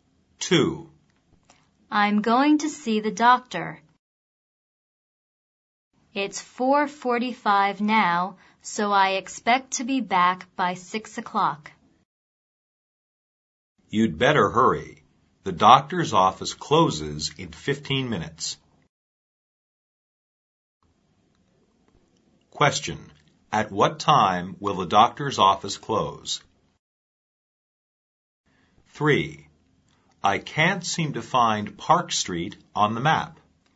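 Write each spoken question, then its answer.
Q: At what time will the doctor's office close?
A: At 5 o'clock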